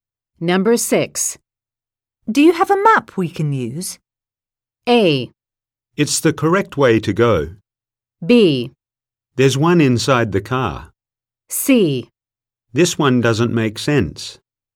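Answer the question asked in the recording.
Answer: B: There's one inside the car.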